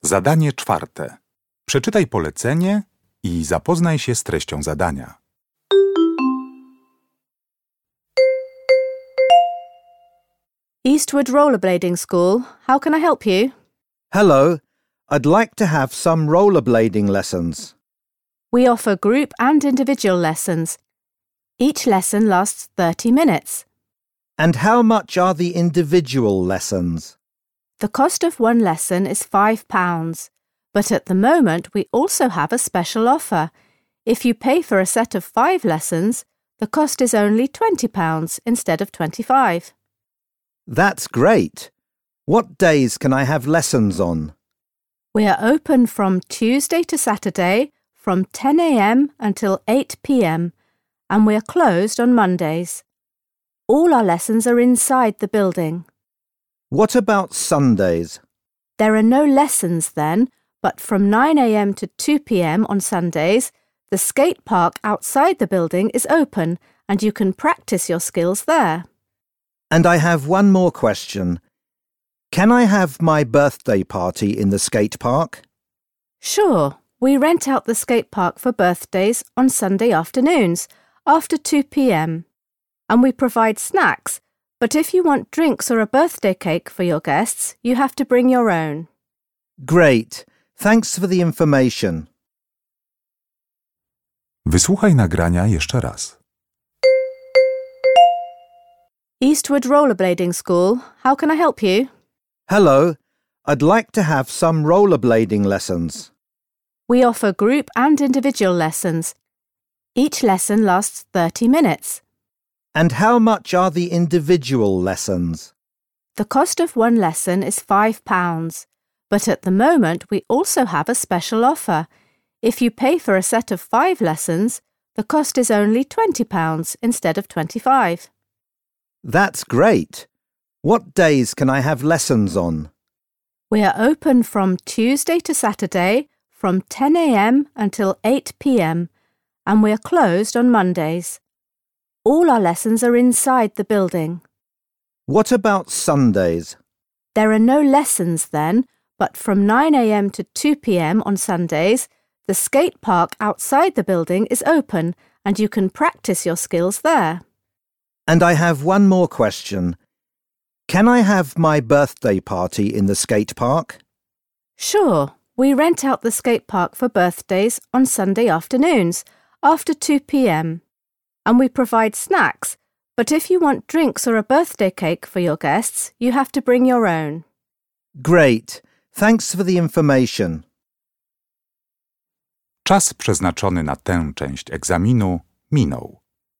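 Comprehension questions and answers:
Uruchamiając odtwarzacz z oryginalnym nagraniem CKE usłyszysz dwukrotnie rozmowę telefoniczną na temat jazdy na rolkach. Na podstawie informacji zawartych w nagraniu uzupełnij luki 4.1.–4.3. w notatce, tak aby jak najbardziej precyzyjnie oddać sens wysłuchanego tekstu. Luki należy uzupełnić w języku angielskim.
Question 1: There is a special offer: five lessons for 4.1. pounds.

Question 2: It's not possible to have rollerblading lessons on 4.2. (and).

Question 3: The school offers 4.3. for birthday parties in the skate park.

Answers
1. 20
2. Mondays and Sundays
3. snacks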